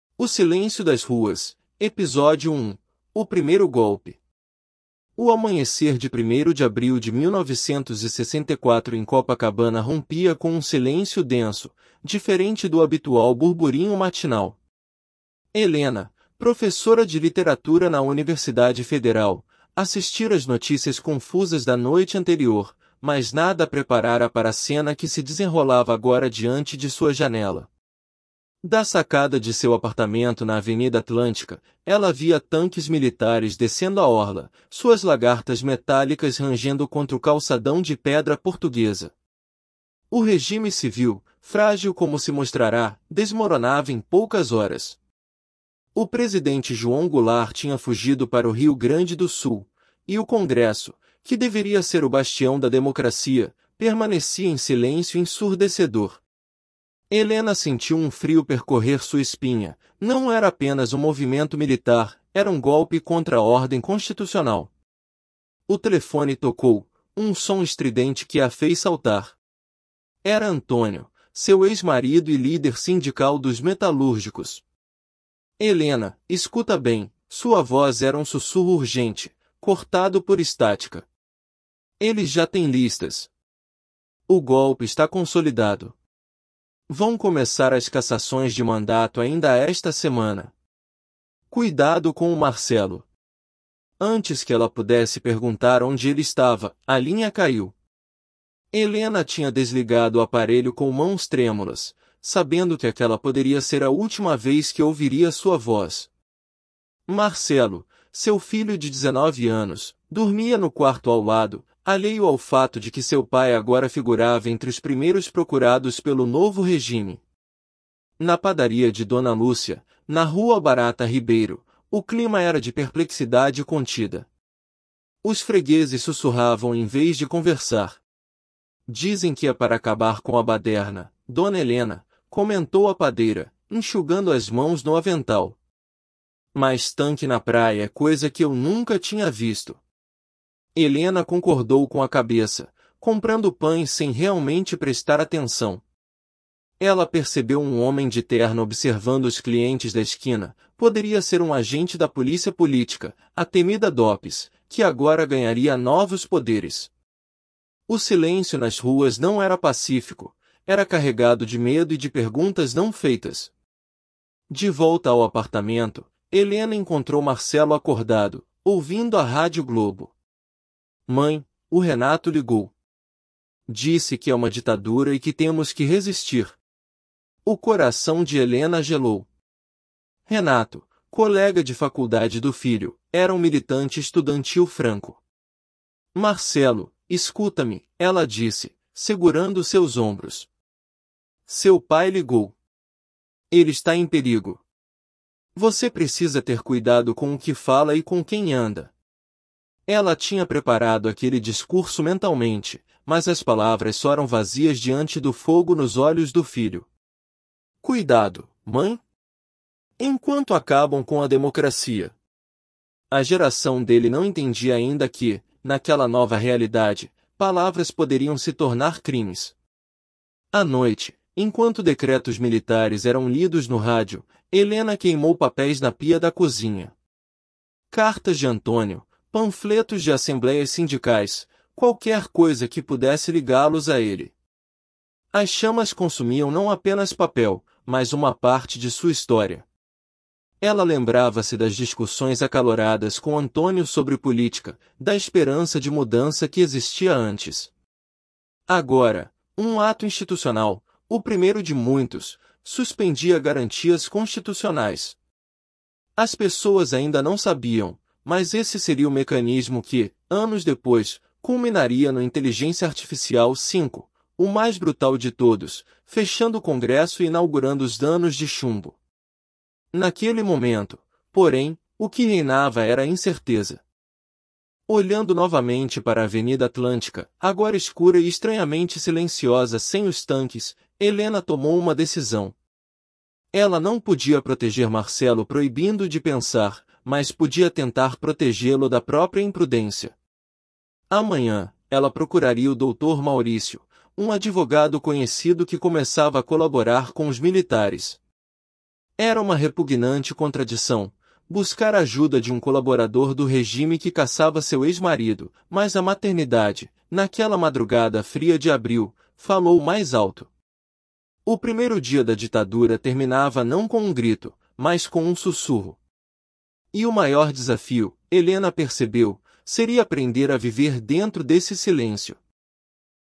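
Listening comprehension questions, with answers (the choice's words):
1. Qual aspecto da nova realidade política é mais difícil para a geração de Marcelo compreender inicialmente?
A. A necessidade de resistência armada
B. O perigo concreto das palavras e associações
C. A complexidade das manobras políticas no Congresso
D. A importância da educação universitária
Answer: O perigo concreto das palavras e associações

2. O que a observação de Dona Lúcia sobre 'tanque na praia' revela sobre a experiência popular do golpe?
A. O apoio entusiástico da população ao militarismo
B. A estranheza e ruptura com a normalidade cotidiana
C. A preparação prévia das forças armadas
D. A superioridade tecnológica dos militares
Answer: A estranheza e ruptura com a normalidade cotidiana

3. Por que Helena sente que seu discurso preparado para Marcelo 'soou vazio'?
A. Porque ela não acreditava no que estava dizendo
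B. Porque a urgência revolucionária do filho era mais poderosa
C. Porque ela estava tremendo demasiado para falar claramente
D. Porque Marcelo já tinha conversado com o pai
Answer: Porque a urgência revolucionária do filho era mais poderosa

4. Qual elemento do texto prenuncia a escalada repressiva que culminaria no AI-5?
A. A fuga do presidente para o Rio Grande do Sul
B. A menção ao primeiro Ato Institucional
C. A presença de tanques na orla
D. A profissão de Helena como professora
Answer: A menção ao primeiro Ato Institucional

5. Como a descrição do homem de terno na padaria contribui para a atmosfera do texto?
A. Introduz um elemento de romance na narrativa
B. Cria uma sensação de vigilância e paranoia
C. Demonstra a elegância da polícia política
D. Mostra a normalidade dos costumes da época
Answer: Cria uma sensação de vigilância e paranoia

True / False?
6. Helena inicialmente subestima a gravidade do movimento militar, acreditando ser apenas uma demonstração de força.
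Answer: False

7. A decisão de Helena de procurar o Dr. Maurício representa uma vitória prática sobre seus princípios ideológicos.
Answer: True

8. O texto sugere que a população em geral apoiava abertamente o golpe como solução para a 'baderna'.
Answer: False

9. Marcelo representa a geração que não compreende imediatamente como a nova realidade transforma expressões políticas em crimes.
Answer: True

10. A queima de documentos por Helena é um ato de resistência simbólica contra o regime.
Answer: False

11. O silêncio do Congresso durante o golpe é apresentado como uma traição à sua função democrática.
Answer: True

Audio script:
O Primeiro Golpe – TEST
O Primeiro Golpe
O amanhecer de 1o de abril de 1964 em Copacabana rompia com um silêncio denso, diferente do habitual burburinho matinal. Helena, professora de Literatura na Universidade Federal, assistira às notícias confusas da noite anterior, mas nada a preparara para a cena que se desenrolava agora diante de sua janela. 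Da sacada de seu apartamento na Avenida Atlântica, ela via tanques militares descendo a orla, suas lagartas metálicas rangendo contra o calçadão de pedra portuguesa. O regime civil, frágil como se mostrara, desmoronava em poucas horas. O presidente João Goulart tinha fugido para o Rio Grande do Sul, e o Congresso, que deveria ser o bastião da democracia, permanecia em silêncio ensurdecedor. Helena sentiu um frio percorrer sua espinha – não era apenas um movimento militar, era um golpe contra a ordem constitucional.
O telefone tocou, um som estridente que a fez saltar. Era Antônio, seu ex-marido e líder sindical dos metalúrgicos. 'Helena, escuta bem', sua voz era um sussurro urgente, cortado por estática. O golpe está consolidado. Vão começar as cassações de mandato ainda esta semana. Cuidado com o Marcelo.' Antes que ela pudesse perguntar onde ele estava, a linha caiu. Helena tinha desligado o aparelho com mãos trêmulas, sabendo que aquela poderia ser a última vez que ouviria sua voz. 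Marcelo, seu filho de dezenove anos, dormia no quarto ao lado, alheio ao fato de que seu pai agora figurava entre os primeiros procurados pelo novo regime.
Na padaria de Dona Lúcia, na Rua Barata Ribeiro, o clima era de perplexidade contida. Os fregueses sussurravam em vez de conversar. 'Dizem que é para acabar com a baderna, dona Helena', comentou a padeira, enxugando as mãos no avental. 'Mas tanque na praia é coisa que eu nunca tinha visto.' Helena concordou com a cabeça, comprando pães sem realmente prestar atenção. Ela percebeu um homem de terno observando os clientes da esquina – poderia ser um agente da polícia política, a temida DOPS, que agora ganharia novos poderes. O silêncio nas ruas não era pacífico; era carregado de medo e de perguntas não feitas.
De volta ao apartamento, Helena encontrou Marcelo acordado, ouvindo a Rádio Globo. 'Mãe, o Renato ligou. Disse que é uma ditadura e que temos que resistir.' O coração de Helena gelou. 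Renato, colega de faculdade do filho, era um militante estudantil franco. 'Marcelo, escuta-me', ela disse, segurando seus ombros. 'Seu pai ligou. Ele está em perigo. Você precisa ter cuidado com o que fala e com quem anda.' Ela tinha preparado aquele discurso mentalmente, mas as palavras soaram vazias diante do fogo nos olhos do filho. 'Cuidado, mãe? Enquanto acabam com a democracia?' A geração dele não entendia ainda que, naquela nova realidade, palavras poderiam se tornar crimes.
À noite, enquanto decretos militares eram lidos no rádio, Helena queimou papéis na pia da cozinha. Cartas de Antônio, panfletos de assembleias sindicais, qualquer coisa que pudesse ligá-los a ele. As chamas consumiam não apenas papel, mas uma parte de sua história. Ela lembrava-se das discussões acaloradas com Antônio sobre política, da esperança de mudança que existia antes. Agora, um Ato Institucional – o primeiro de muitos – suspendia garantias constitucionais. 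As pessoas ainda não sabiam, mas esse seria o mecanismo que, anos depois, culminaria no AI-5, o mais brutal de todos, fechando o Congresso e inaugurando os 'anos de chumbo'. Naquele momento, porém, o que reinava era a incerteza.
Olhando novamente para a Avenida Atlântica, agora escura e estranhamente silenciosa sem os tanques, Helena tomou uma decisão. Ela não podia proteger Marcelo proibindo-o de pensar, mas podia tentar protegê-lo da própria imprudência. Amanhã, ela procuraria o Dr. Maurício, um advogado conhecido que começava a colaborar com os militares. Era uma repugnante contradição – buscar ajuda de um colaborador do regime que caçava seu ex-marido – mas a maternidade, naquela madrugada fria de abril, falou mais alto. O primeiro dia da ditadura terminava não com um grito, mas com um sussurro. E o maior desafio, Helena percebeu, seria aprender a viver dentro desse silêncio.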